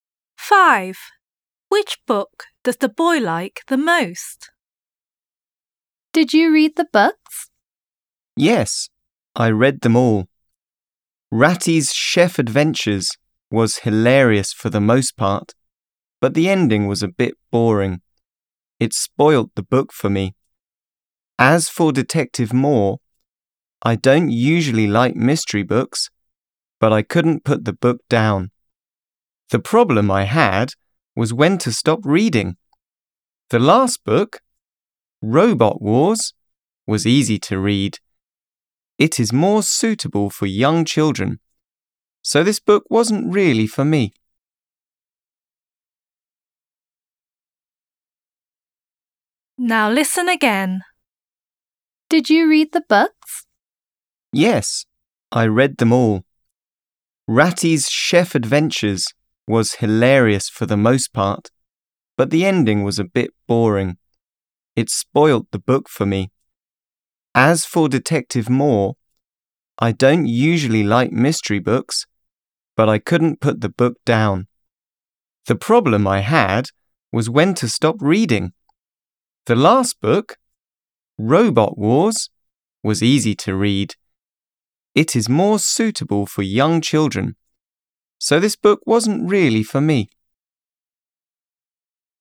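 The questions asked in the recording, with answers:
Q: Which book does the boy like the most?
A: Detective Moore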